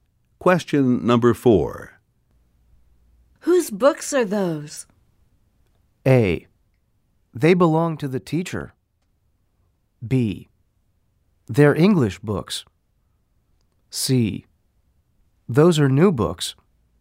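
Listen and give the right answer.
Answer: A: They belong to the teacher.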